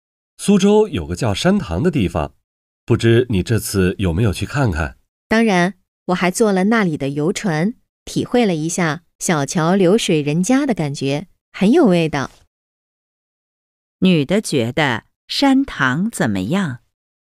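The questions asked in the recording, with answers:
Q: 女的觉得山塘怎么样?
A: 很有味道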